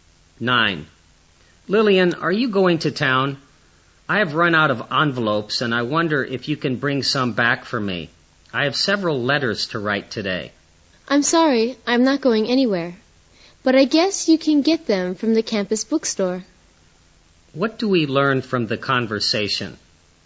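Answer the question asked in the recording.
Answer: Lillian isn't going to town, so the man can buy envelopes at the campus bookstore.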